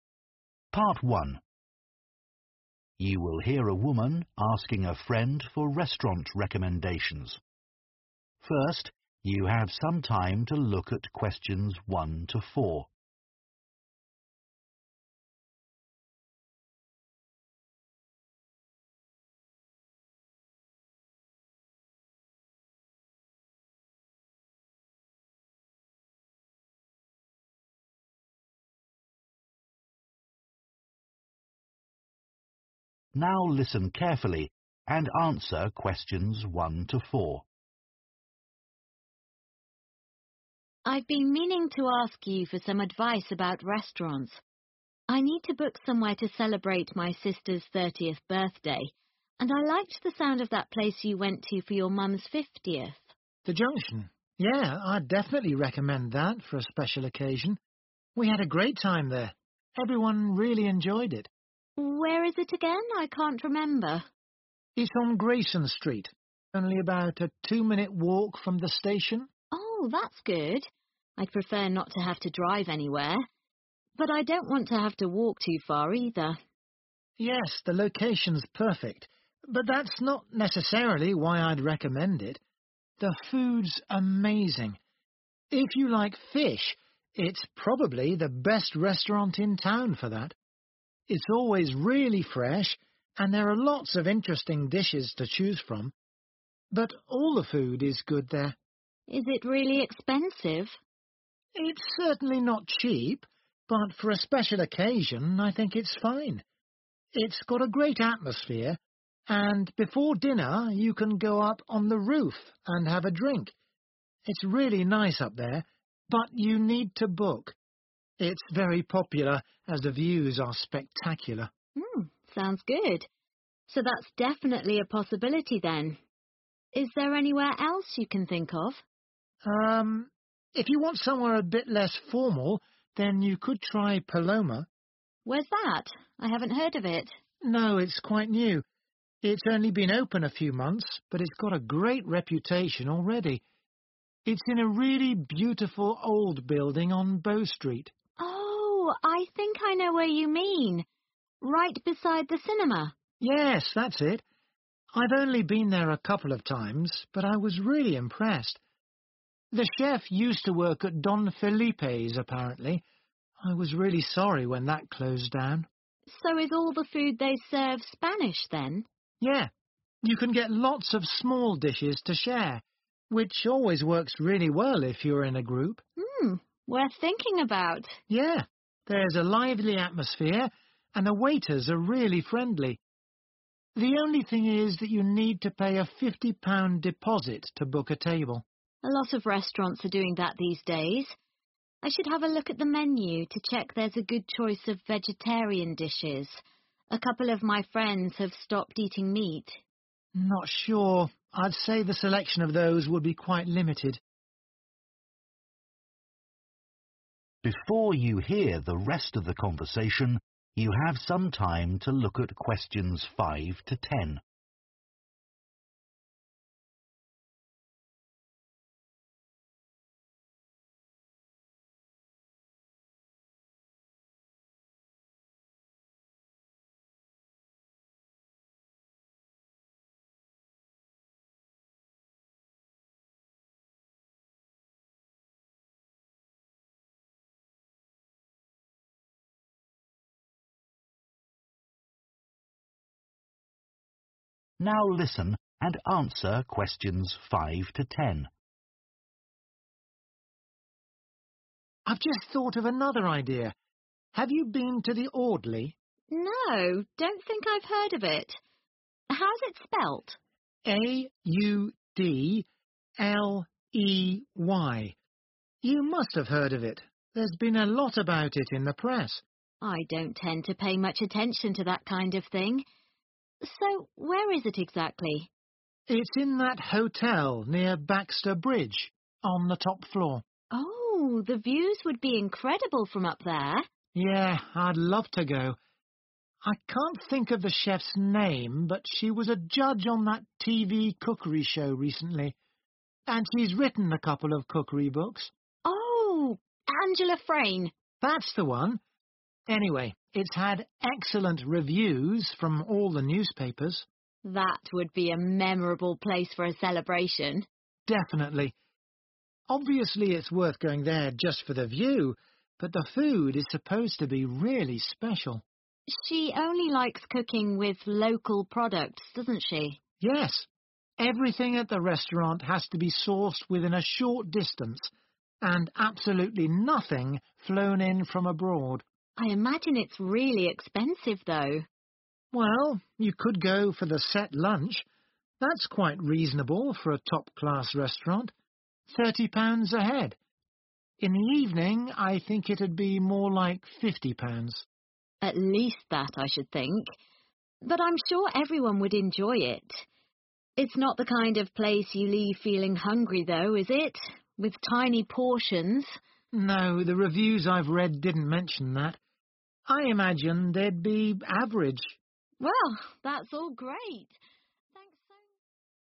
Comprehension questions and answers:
Complete the notes below. Write ONE WORD AND/OR A NUMBER for each answer.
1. Good for people who are especially keen on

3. food, good for sharing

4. A limited selection of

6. At the top of a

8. Only uses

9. Set lunch costs £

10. Portions probably of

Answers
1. Fish
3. Spanish
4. Vegetarian
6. Hotel
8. Local
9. 30
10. Average

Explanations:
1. The correct answer is 'Fish' because the man recommends The Junction as a great place for people who like fish. He says it is probably the best restaurant in town for fish and that the food is always very fresh. This shows that people who are keen on eating fish will enjoy dining there.
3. The correct answer is 'Spanish' because the man mentions that Paloma serves lots of small dishes that are typically Spanish. He says, 'Yeah. You can get lots of small dishes to share, which always works really well if you're in a group.' This shows that the restaurant specializes in Spanish food.
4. The correct answer is 'Vegetarian' because in the transcript, the woman mentions checking the menu for vegetarian dishes. The man responds that the selection of vegetarian food would be quite limited at the restaurant Paloma. This shows that vegetarian options are important when considering the restaurant choices.
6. The correct answer is 'Hotel' because the transcript mentions that the restaurant Audley is located on the top floor of a hotel, which is near Baxter Bridge. This indicates that the place the restaurant is in is indeed a hotel.
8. The correct answer is 'local' because the restaurant we discussed only uses ingredients that are from nearby areas. The woman mentioned that the chef likes to cook with local products, which is a key reason for recommending the restaurant.
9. The correct answer is 30 because the woman and man discussed the prices of meals at the restaurant Audley. They mentioned that the set lunch is quite reasonable for a top-class restaurant, costing around 30 pounds per person. This shows that for a special lunch, the price would be 30.
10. The correct answer is 'Average' because the man in the conversation mentions that the reviews for the restaurant did not say the portions were tiny, suggesting they are of normal size. This indicates that the food portions are average, so you won't leave feeling hungry.

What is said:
WOMAN: I've been meaning to ask you for some advice about restaurants. I need to book somewhere to celebrate my sister's 30th birthday, and I liked the sound of that place you went to for your mum's 50th.
MAN: The Junction. Yeah, I'd definitely recommend that for a special occasion. We had a great time there. Everyone really enjoyed it.
WOMAN: Where is it again? I can't remember.
MAN: It on Grayson Street only about a two walk from the station
WOMAN: Oh that good I prefer not to have to drive anywhere But I don want to have to walk too far either.
MAN: Yes, the location's perfect, but that's not necessarily why I'd recommend it. The food's amazing. If you like fish, it's probably the best restaurant in town for that. It's always really fresh and there are lots of interesting dishes to choose from But all the food is good there
WOMAN: Is it really expensive?
MAN: It's certainly not cheap, but for a special occasion I think it's fine It's got a great atmosphere and before dinner you can go up on the roof and have a drink It's really nice up there, but you need to book It's very popular as the views are spectacular.
WOMAN: Sounds good. So that's definitely a possibility then. Is there anywhere else you can think of?
MAN: If you want somewhere a bit less formal, then you could try Paloma.
WOMAN:Where's that? I haven't heard of it.
MAN: No, it's quite new. It's only been open a few months, but it's got a great reputation already. It's in a really beautiful old building on Bow Street.
WOMAN:Oh, I think I know where you mean. Right beside the cinema.
MAN: Yes, that's it. I've only been there a couple of times, but I was really impressed. The chef used to work at Don Felipe's, apparently. I was really sorry when that closed down.
WOMAN: So is all the food they serve Spanish, then?
MAN: Yeah. You can get lots of small dishes to share, which always works really well if you're in a group.
WOMAN: Hmm. Worth thinking about.
MAN: Yeah. There's a lively atmosphere and the waiters are really friendly. The only thing is that you need to pay a £50 deposit to book a table.
WOMAN: A lot of restaurants are doing that these days. I should have a look at the menu to check there a good choice of vegetarian dishes. A couple of my friends have stopped eating meat.
MAN: Not sure I say the selection of those would be quite limited.
MAN: I've just thought of another idea. Have you been to the Audley?
WOMAN: No, don't think I've heard of it. How's it spelt?
MAN: A-U-D-L-E-Y. You must have heard of it. There's been a lot about it in the press.
WOMAN: I don't tend to pay much attention to that kind of thing. So where is it exactly?
MAN: It's in that hotel near Baxter Bridge, on the top floor.
WOMAN: Oh, the views would be incredible from up there.
MAN: Yeah, I'd love to go. I can't think of the chef's name, but she was a judge on that TV cookery show recently. And she's written a couple of cookery books.
WOMAN: Oh, Angela Frayne.
MAN: That's the one. Anyway, it's had excellent reviews from all the newspapers.
WOMAN: That would be a memorable place for a celebration.
MAN: Definitely. Obviously it's worth going there just for the view, but the food is supposed to be really special.
WOMAN: She only likes cooking with local products doesn't she?
MAN: Yes. Everything at the restaurant has to be sourced within a short distance and absolutely nothing flown in from abroad.
WOMAN: I imagine it's really expensive, though.
MAN: Well, you could go for the set lunch. That's quite reasonable for a top-class restaurant. £30 a head. In the evening, I think it'd be more like £50.
WOMAN: At least that, I should think. But I'm sure everyone would enjoy it. It's not the kind of place you leave feeling hungry, though, is it? With tiny portions?
MAN: No, the reviews I've read didn't mention that. I imagine they'd be average.
WOMAN: Well, that's all great. Thanks so much.